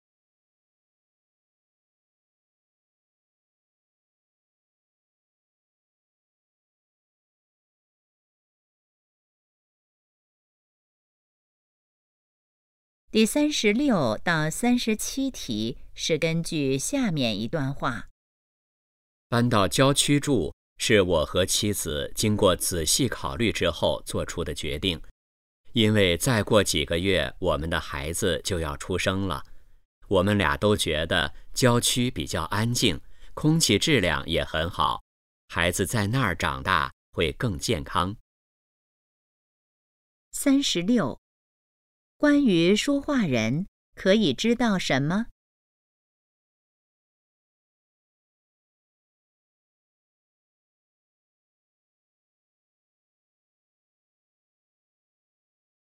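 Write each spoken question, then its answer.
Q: 说话人觉得郊区怎么样?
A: 安静,空气好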